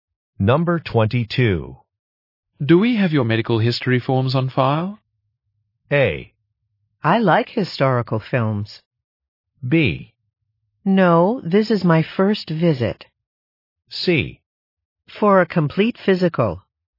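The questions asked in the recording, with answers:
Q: Do we have your medical history forms on file?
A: B: No, this is my first visit.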